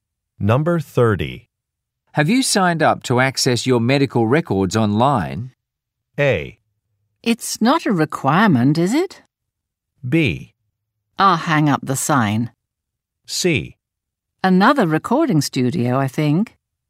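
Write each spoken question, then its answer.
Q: Have you signed up to access your medical records online?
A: A: It's not a requirement, is it?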